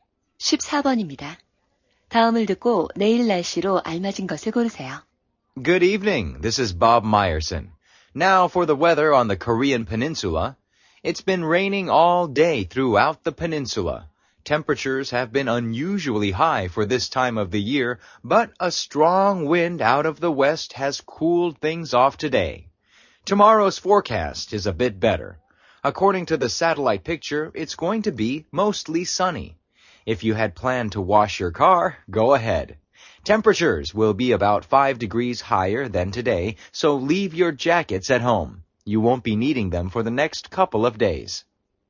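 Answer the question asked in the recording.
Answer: 대체로 맑고 따뜻함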